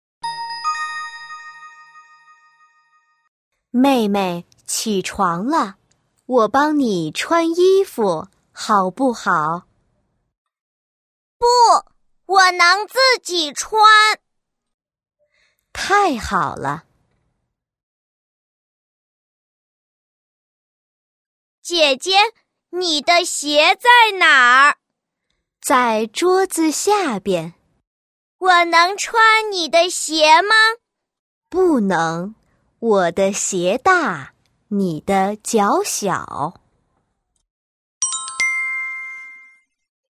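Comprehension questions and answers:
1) 妹妹让姐姐帮她穿衣服吗?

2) 妹妹能穿姐姐的鞋吗?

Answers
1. 不,她能自己穿。
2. 不能,姐姐的鞋大,她的脚小。

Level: YCT 3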